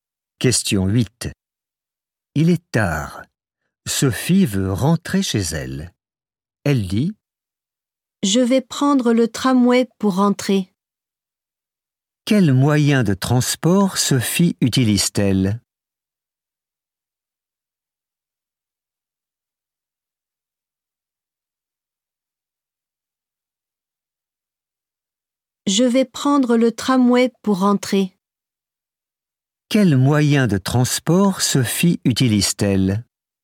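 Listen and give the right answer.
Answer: Le tramway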